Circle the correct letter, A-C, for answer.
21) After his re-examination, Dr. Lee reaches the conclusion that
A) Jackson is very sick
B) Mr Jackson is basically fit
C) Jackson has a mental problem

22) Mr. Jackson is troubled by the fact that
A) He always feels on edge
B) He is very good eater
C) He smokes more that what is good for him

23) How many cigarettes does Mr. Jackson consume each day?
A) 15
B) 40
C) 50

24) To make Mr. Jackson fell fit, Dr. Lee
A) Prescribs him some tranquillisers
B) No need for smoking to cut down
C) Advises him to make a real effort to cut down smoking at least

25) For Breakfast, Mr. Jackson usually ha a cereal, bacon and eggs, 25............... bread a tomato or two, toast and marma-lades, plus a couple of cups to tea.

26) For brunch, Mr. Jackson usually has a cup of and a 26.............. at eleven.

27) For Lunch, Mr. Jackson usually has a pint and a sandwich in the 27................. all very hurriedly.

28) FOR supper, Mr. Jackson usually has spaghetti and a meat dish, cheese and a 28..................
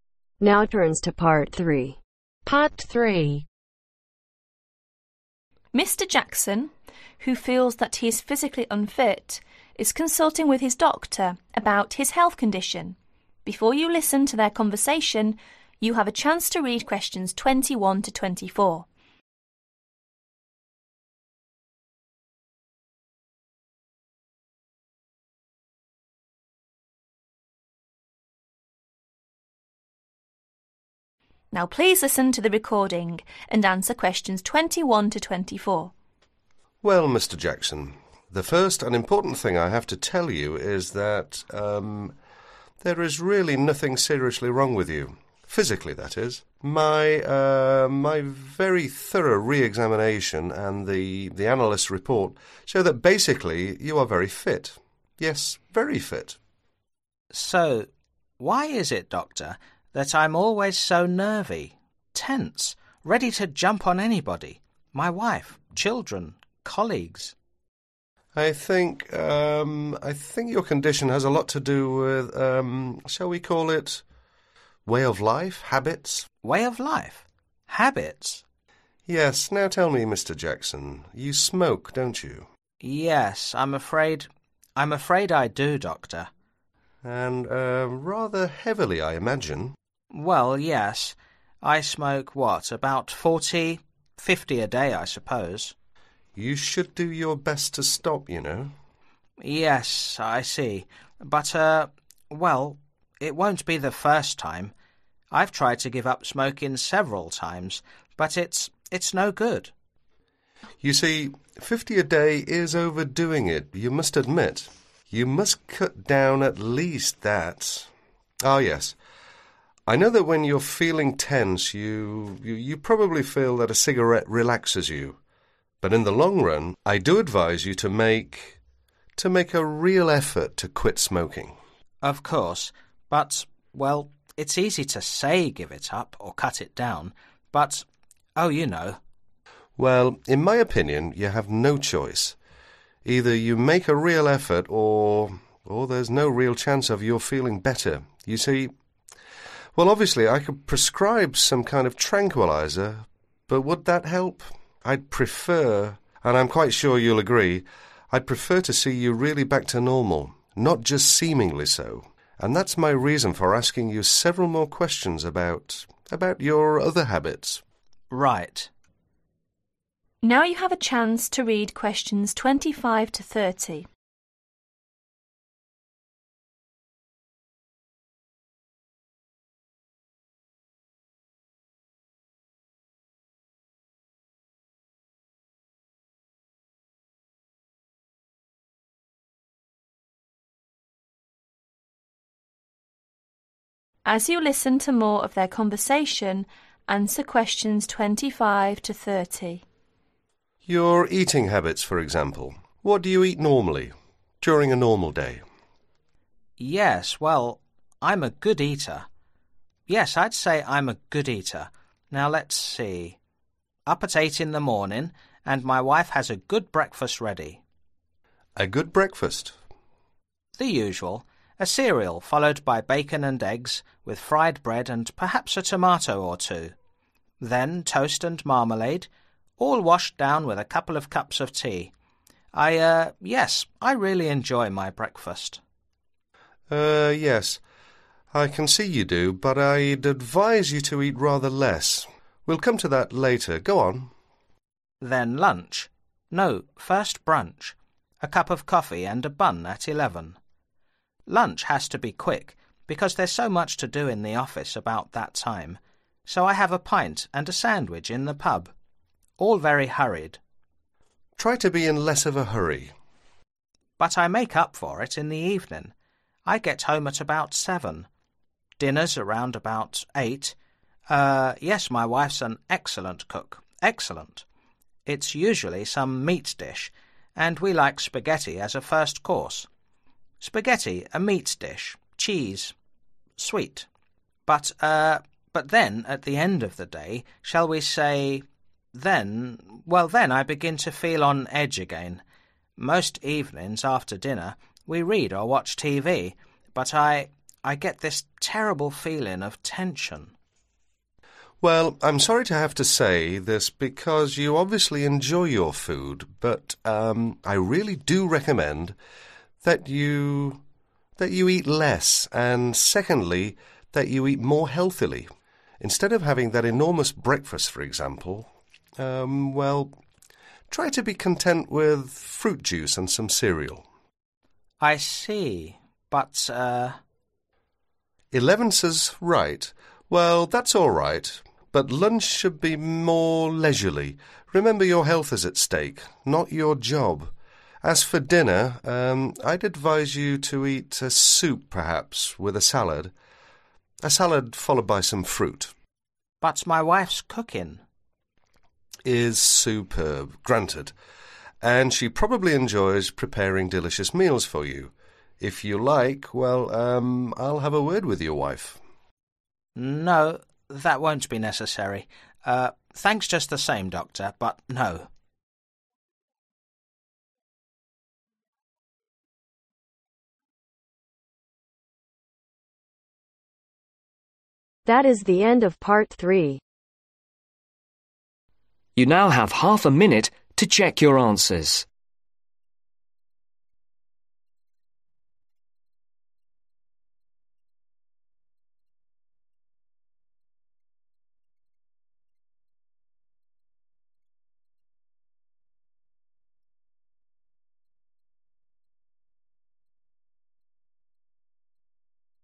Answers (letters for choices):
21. B
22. A
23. C
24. C
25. Fried
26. Bun
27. Pub
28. Sweet